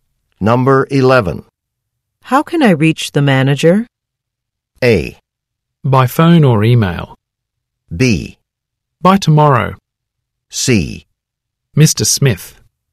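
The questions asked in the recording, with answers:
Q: How can I reach the manager?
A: A: By phone or email.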